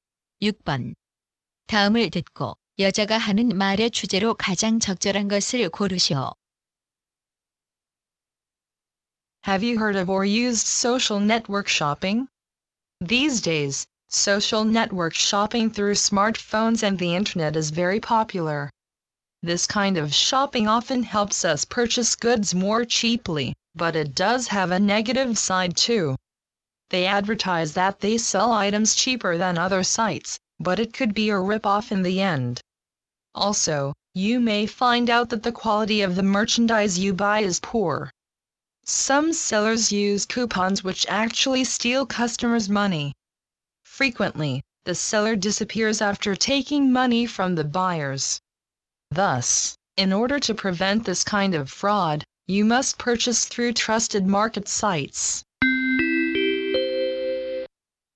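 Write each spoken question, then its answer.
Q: 다음을 듣고 여자가 하는 말의 주제로 가장 적절한 것을 고르시오.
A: 소셜 네트워크 쇼핑의 위험성과 신뢰할 수 있는 사이트 이용의 필요성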